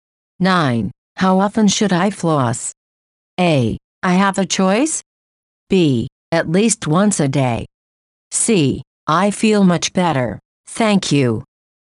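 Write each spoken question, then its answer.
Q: How often should I floss?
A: B: At least once a day.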